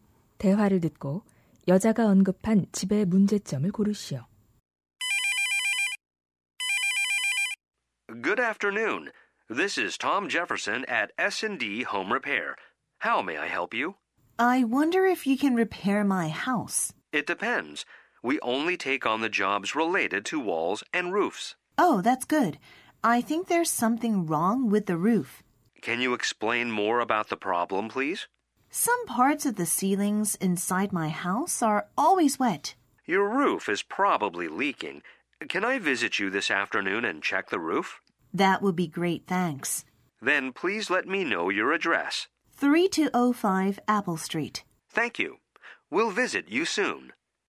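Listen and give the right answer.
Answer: 지붕이 새서 집 안 천장 일부가 항상 젖어 있음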